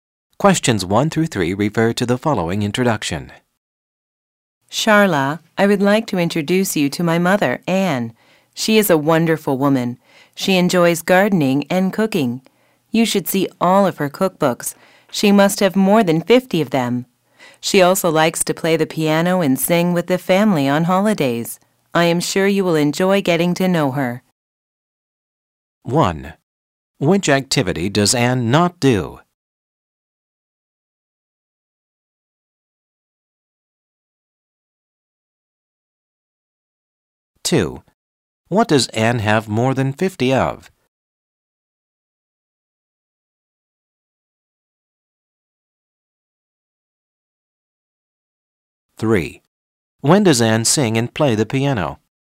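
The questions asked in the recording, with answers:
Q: What does Anne have more than 50 of?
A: Cookbooks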